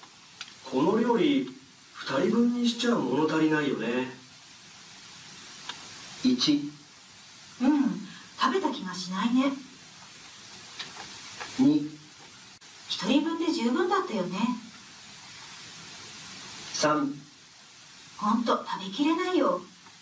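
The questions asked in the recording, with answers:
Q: この料理2人分にしちゃ物足りないよね。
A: 1: うん、食べた気がしないね。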